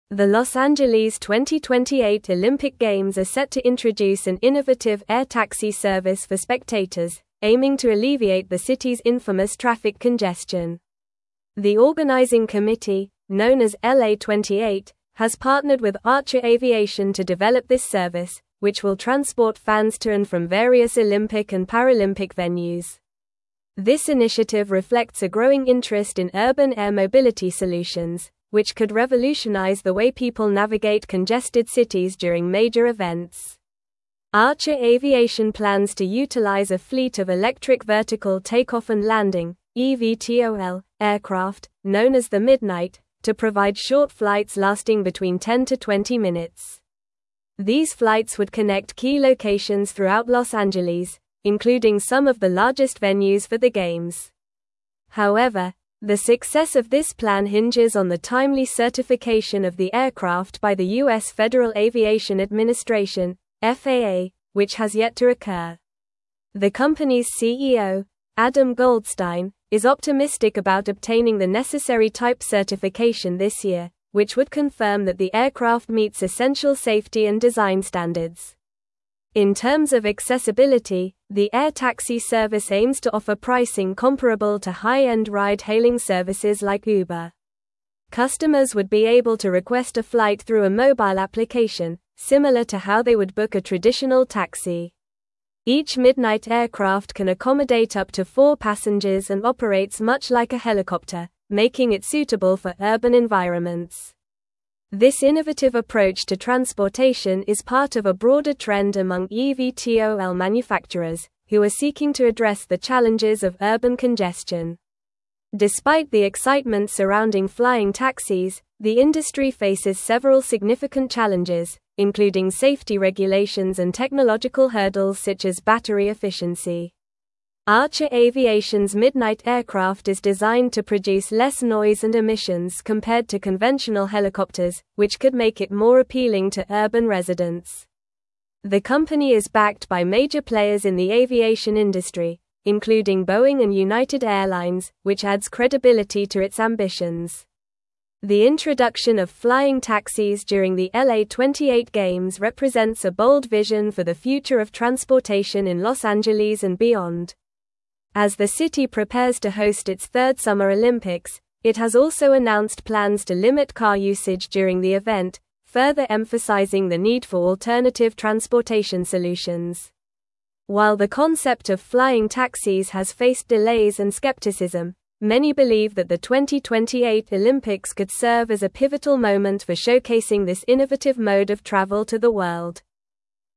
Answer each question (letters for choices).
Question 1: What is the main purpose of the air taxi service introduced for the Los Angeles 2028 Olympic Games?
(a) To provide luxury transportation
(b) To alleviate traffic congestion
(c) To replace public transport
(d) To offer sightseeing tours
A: b

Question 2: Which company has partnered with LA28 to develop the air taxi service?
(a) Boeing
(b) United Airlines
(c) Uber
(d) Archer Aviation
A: d

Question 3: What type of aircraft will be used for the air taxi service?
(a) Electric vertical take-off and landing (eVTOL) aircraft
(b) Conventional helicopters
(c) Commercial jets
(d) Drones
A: a

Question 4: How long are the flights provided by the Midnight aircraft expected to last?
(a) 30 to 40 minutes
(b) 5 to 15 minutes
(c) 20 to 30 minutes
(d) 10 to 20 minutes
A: d

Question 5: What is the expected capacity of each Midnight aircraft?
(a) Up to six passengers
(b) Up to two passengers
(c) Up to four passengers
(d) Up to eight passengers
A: c

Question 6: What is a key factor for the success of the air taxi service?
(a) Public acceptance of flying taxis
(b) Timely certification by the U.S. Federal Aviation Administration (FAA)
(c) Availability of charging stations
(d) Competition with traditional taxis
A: b

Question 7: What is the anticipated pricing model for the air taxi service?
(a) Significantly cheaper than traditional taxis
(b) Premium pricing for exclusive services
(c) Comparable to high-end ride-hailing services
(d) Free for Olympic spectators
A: c

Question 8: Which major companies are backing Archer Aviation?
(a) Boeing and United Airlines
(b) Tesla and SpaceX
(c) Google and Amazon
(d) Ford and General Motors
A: a

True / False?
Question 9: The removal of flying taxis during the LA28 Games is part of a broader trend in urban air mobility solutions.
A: False

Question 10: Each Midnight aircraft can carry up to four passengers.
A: True

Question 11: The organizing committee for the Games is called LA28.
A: True

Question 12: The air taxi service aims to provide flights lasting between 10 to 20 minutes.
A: True

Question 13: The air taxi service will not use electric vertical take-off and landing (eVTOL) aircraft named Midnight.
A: False

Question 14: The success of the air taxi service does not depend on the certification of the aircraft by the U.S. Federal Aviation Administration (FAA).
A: False

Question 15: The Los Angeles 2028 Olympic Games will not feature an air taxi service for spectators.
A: False

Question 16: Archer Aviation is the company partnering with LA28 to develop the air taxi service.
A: True

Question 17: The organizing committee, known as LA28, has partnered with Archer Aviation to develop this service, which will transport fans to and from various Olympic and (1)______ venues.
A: Paralympic

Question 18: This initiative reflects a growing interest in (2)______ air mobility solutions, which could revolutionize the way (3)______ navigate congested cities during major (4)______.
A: urban

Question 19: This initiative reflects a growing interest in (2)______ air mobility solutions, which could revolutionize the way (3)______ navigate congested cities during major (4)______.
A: people

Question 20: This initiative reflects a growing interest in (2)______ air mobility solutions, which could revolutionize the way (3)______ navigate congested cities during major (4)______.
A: events

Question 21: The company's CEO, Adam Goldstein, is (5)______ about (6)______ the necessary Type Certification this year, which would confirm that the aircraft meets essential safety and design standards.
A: optimistic

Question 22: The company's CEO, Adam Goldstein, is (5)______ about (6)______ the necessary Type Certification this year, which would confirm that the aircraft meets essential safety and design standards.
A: obtaining

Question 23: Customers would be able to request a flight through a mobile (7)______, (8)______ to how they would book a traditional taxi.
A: application

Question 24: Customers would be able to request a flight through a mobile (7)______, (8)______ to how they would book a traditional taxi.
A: similar

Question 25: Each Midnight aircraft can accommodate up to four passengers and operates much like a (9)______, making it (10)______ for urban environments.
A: helicopter

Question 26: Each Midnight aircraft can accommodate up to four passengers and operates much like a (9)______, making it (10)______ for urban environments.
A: suitable

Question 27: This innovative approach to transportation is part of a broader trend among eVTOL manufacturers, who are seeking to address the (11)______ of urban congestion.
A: challenges

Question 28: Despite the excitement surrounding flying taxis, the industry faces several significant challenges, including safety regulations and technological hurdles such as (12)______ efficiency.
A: battery

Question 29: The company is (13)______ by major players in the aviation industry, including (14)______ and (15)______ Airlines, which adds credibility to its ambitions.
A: backed

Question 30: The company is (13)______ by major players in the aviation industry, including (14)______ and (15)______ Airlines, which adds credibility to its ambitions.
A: Boeing

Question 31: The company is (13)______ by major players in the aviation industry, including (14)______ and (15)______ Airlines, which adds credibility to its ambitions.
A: United

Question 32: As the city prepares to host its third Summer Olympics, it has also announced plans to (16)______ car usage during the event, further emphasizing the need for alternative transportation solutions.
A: limit

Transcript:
The Los Angeles 2028 Olympic Games are set to introduce an innovative air taxi service for spectators, aiming to alleviate the city's infamous traffic congestion. The organizing committee, known as LA28, has partnered with Archer Aviation to develop this service, which will transport fans to and from various Olympic and Paralympic venues. This initiative reflects a growing interest in urban air mobility solutions, which could revolutionize the way people navigate congested cities during major events.
Archer Aviation plans to utilize a fleet of electric vertical take-off and landing (eVTOL) aircraft, known as the Midnight, to provide short flights lasting between 10 to 20 minutes. These flights would connect key locations throughout Los Angeles, including some of the largest venues for the Games. However, the success of this plan hinges on the timely certification of the aircraft by the U.S. Federal Aviation Administration (FAA), which has yet to occur. The company's CEO, Adam Goldstein, is optimistic about obtaining the necessary Type Certification this year, which would confirm that the aircraft meets essential safety and design standards.
In terms of accessibility, the air taxi service aims to offer pricing comparable to high-end ride-hailing services like Uber. Customers would be able to request a flight through a mobile application, similar to how they would book a traditional taxi. Each Midnight aircraft can accommodate up to four passengers and operates much like a helicopter, making it suitable for urban environments. This innovative approach to transportation is part of a broader trend among eVTOL manufacturers, who are seeking to address the challenges of urban congestion.
Despite the excitement surrounding flying taxis, the industry faces several significant challenges, including safety regulations and technological hurdles such as battery efficiency. Archer Aviation's Midnight aircraft is designed to produce less noise and emissions compared to conventional helicopters, which could make it more appealing to urban residents. The company is backed by major players in the aviation industry, including Boeing and United Airlines, which adds credibility to its ambitions.
The introduction of flying taxis during the LA28 Games represents a bold vision for the future of transportation in Los Angeles and beyond. As the city prepares to host its third Summer Olympics, it has also announced plans to limit car usage during the event, further emphasizing the need for alternative transportation solutions. While the concept of flying taxis has faced delays and skepticism, many believe that the 2028 Olympics could serve as a pivotal moment for showcasing this innovative mode of travel to the world.

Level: Level 4